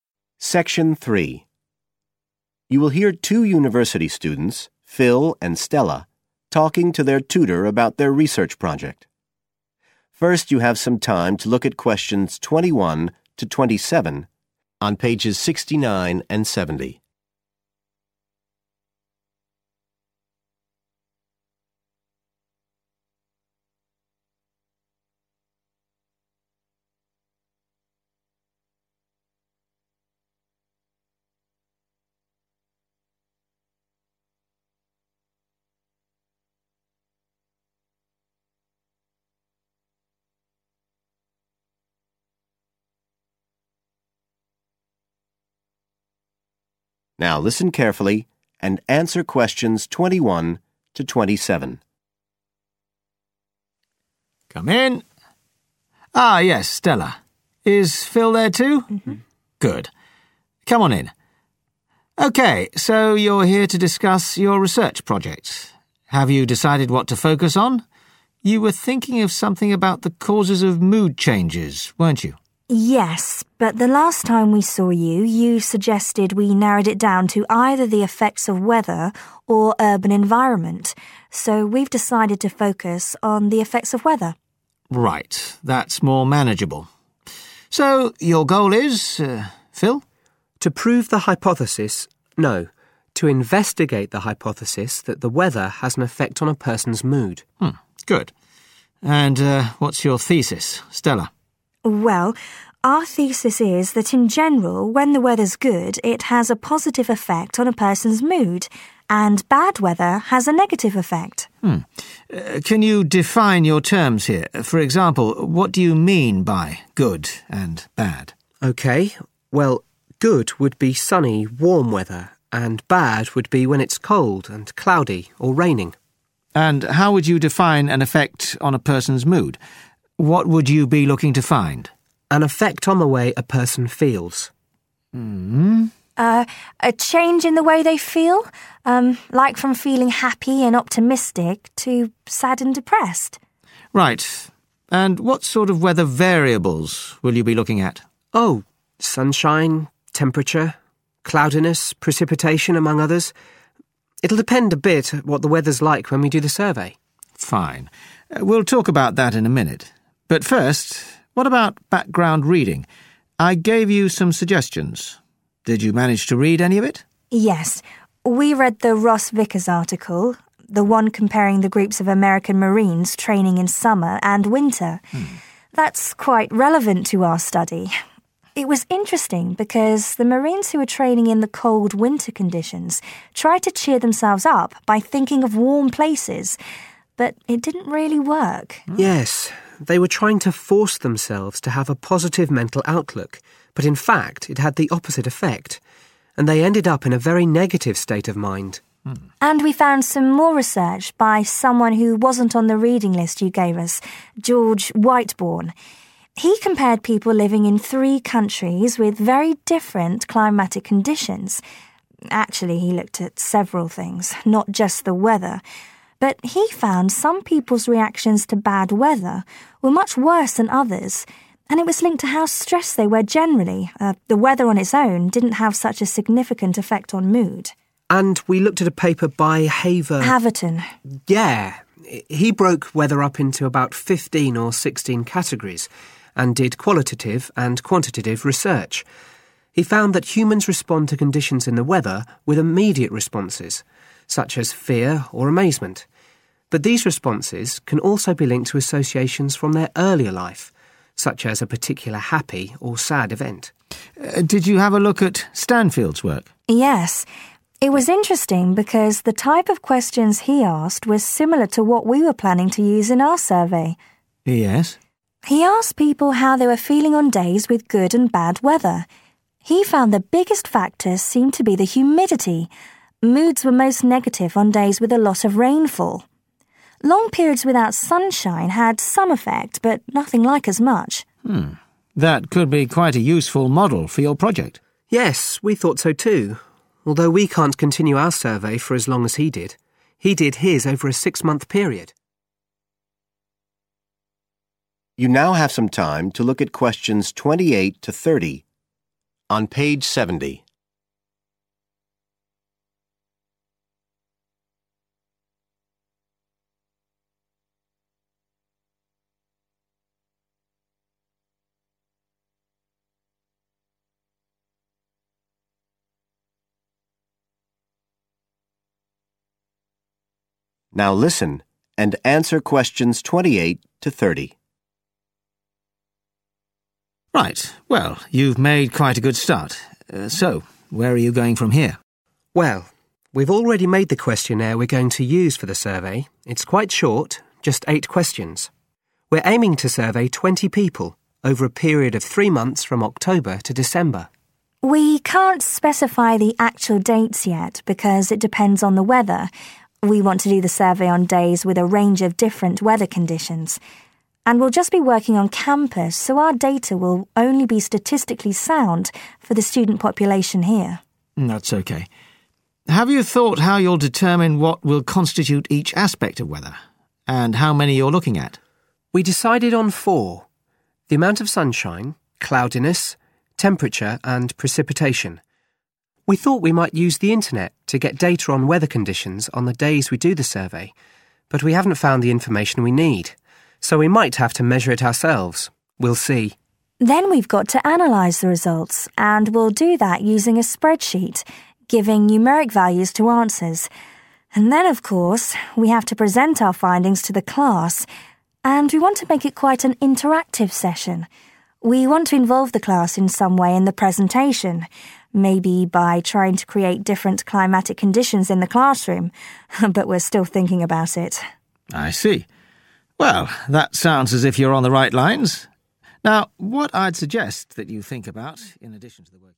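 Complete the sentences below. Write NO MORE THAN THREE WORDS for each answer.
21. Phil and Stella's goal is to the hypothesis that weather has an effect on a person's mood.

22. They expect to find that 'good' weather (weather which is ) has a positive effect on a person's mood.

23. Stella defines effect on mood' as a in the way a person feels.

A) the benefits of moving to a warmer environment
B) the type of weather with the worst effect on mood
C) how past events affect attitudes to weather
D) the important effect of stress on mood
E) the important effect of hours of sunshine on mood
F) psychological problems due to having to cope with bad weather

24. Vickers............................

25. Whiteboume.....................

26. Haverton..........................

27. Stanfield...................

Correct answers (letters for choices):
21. investigate
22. sunny and warm
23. change
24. 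F
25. D
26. C
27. B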